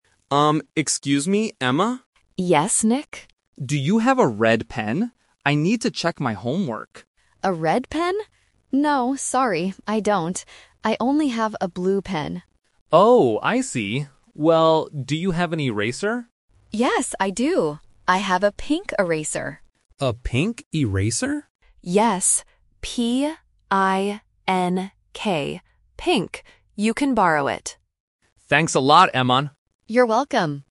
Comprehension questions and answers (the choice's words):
Listen to the conversation between two classmates and choose the correct answer (A, B, or C).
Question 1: What did the boy want to borrow at first?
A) A blue pen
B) A red pen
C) A pink eraser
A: A red pen

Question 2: What school supply does the girl have?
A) A red pen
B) A blue pen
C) A red eraser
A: A blue pen

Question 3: How do you spell the color of the eraser?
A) P-I-N-K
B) P-I-N-G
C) B-I-N-K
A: P-I-N-K

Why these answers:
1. The boy asks "Do you have a red pen?". Option (A) is a trap because the girl says she has a "blue pen", and option (C) is what he borrows later.
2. The girl clearly says "No, sorry, I don't [have a red pen]. I only have a blue pen." Options (A) and (C) are incorrect because she denies having them.
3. The girl explicitly spells the word: "P-I-N-K. Pink." Option (B) and (C) are traps using similar-sounding letters (G vs K, B vs P) to test A1 phonics.

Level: A1